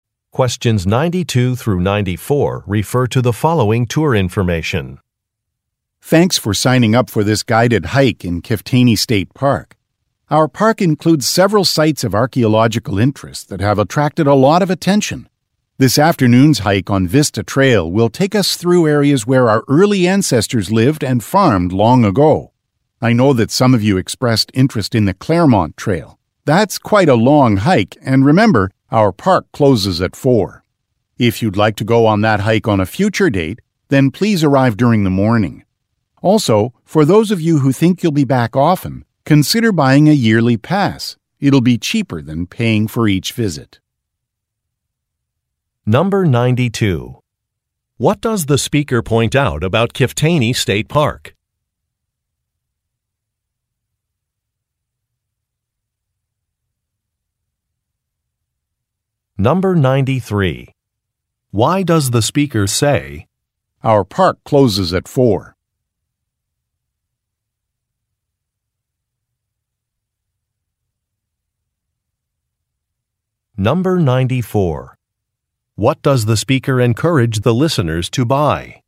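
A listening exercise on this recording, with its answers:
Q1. What does the speaker point out about Kiftaynee State Park?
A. It is the largest in the region.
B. It has some unusual wildlife.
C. It is maintained entirely by volunteers.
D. It has unique archaeological sites.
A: It has unique archaeological sites.

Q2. Why does the speaker say, "our park closes at four"?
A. To encourage a faster hiking pace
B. To announce a change in park hours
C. To indicate why a trail is not an option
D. To emphasize that camping is not permitted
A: To indicate why a trail is not an option

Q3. What does the speaker encourage the listeners to buy?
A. A park map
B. Some hiking poles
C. An annual pass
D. A bird-watching guide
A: An annual pass

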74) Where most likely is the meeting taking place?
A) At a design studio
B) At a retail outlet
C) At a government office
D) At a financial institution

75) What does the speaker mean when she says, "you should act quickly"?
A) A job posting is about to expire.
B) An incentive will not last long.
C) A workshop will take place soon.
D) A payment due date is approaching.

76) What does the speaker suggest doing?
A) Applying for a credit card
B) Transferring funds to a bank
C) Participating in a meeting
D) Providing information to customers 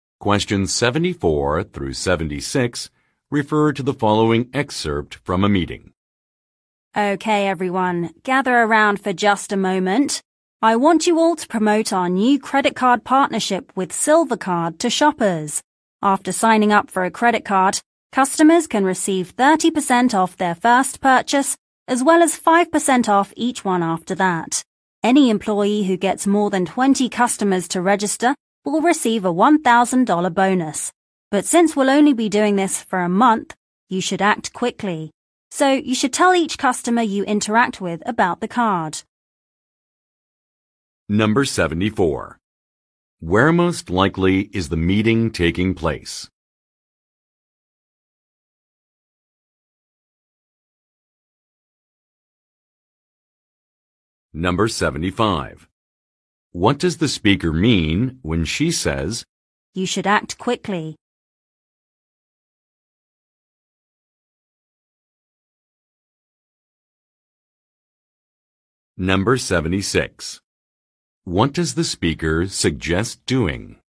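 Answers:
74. At a retail outlet
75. An incentive will not last long.
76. Providing information to customers

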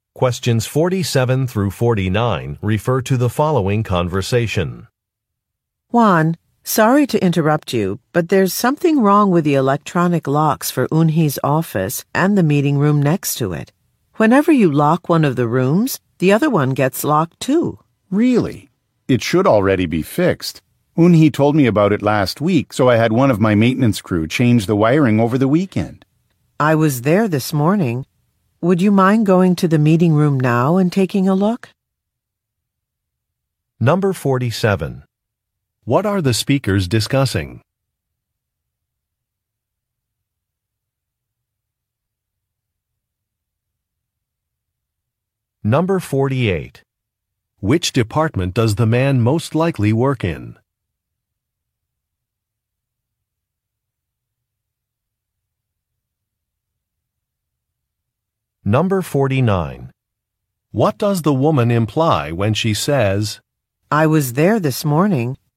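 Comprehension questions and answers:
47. What are the speakers discussing?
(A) Some broken locks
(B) Some missing equipment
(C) A department purchase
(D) A floor plan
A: Some broken locks

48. Which department does the man most likely work in?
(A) Human Resources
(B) Legal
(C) Maintenance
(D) Sales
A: Maintenance

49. What does the woman imply when she says, "I was there this morning"?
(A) A schedule will be revised.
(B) A problem was not resolved.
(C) An explanation is not necessary.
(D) An appointment ended early.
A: A problem was not resolved.

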